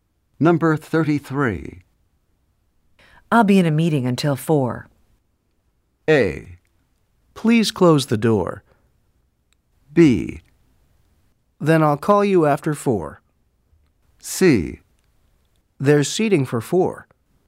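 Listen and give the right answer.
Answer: B: Then I'll call you after 4.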